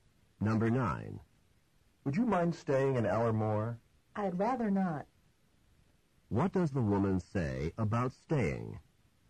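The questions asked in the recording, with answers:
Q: What does the woman say about staying?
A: She would prefer not to stay.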